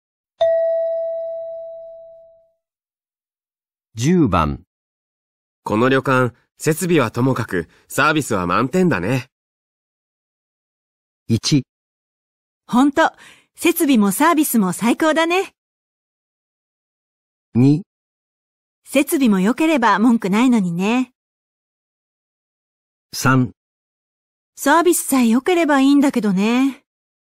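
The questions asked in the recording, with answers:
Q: この旅館、設備はともかく、サービスは満点だね。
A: 2: 設備も良ければ文句ないのにね。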